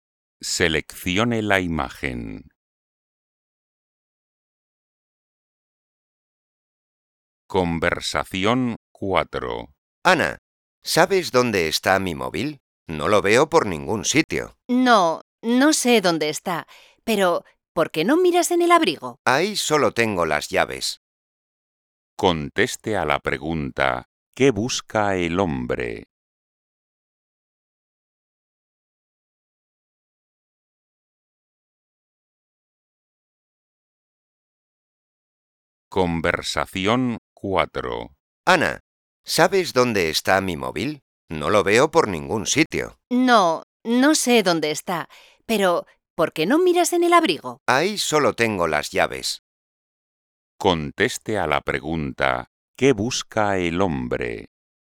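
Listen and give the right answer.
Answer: Su móvil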